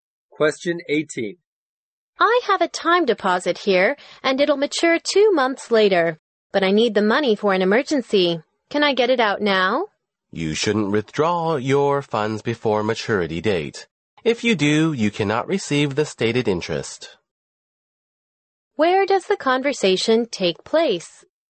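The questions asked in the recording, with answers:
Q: Where does the conversation take place?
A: In a bank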